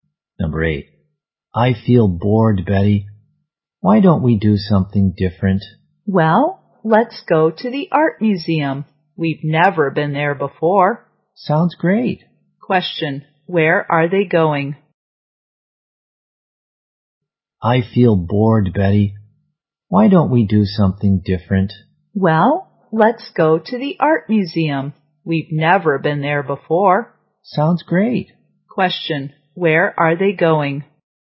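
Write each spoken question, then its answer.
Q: where are they going?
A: To the art museum.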